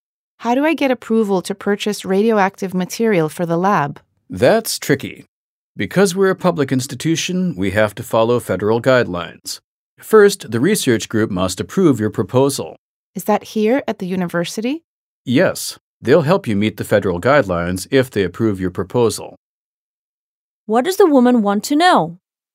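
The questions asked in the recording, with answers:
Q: What does the woman want to know?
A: How to get approval to buy radioactive material for the lab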